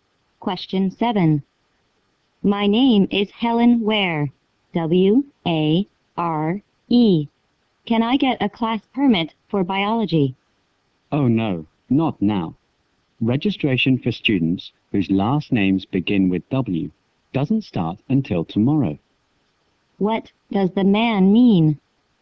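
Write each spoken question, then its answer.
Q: What does the man mean?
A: She can't get the permit today; she must register tomorrow, when students with last names starting with W can register.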